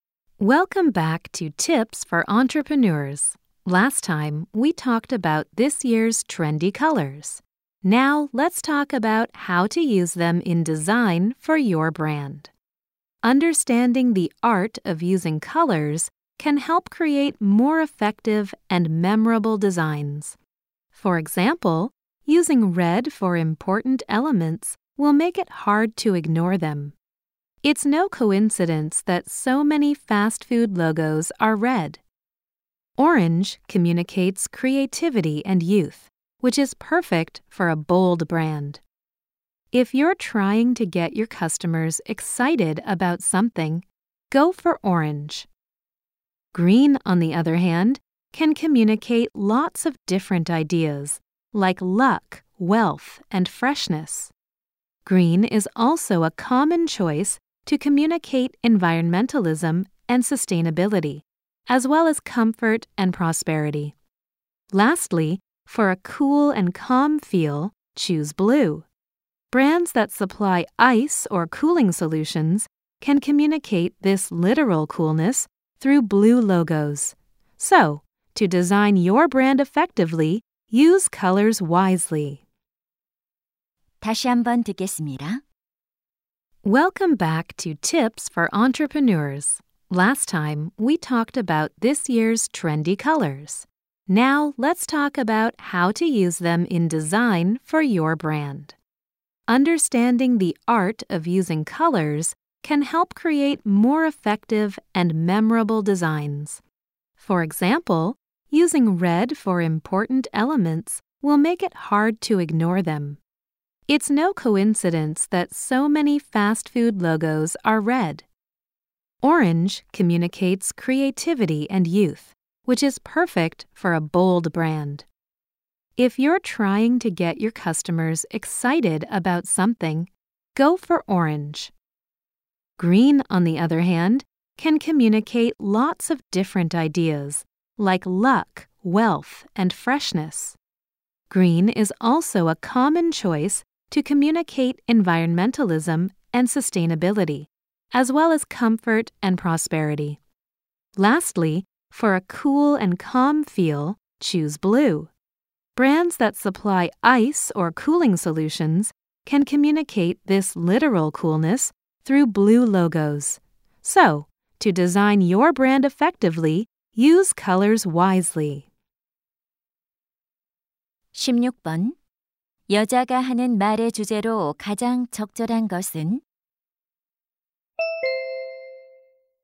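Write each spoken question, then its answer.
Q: 여자가 하는 말의 주제로 가장 적절한 것은?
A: 브랜드 디자인에서 색깔을 효과적으로 사용하는 방법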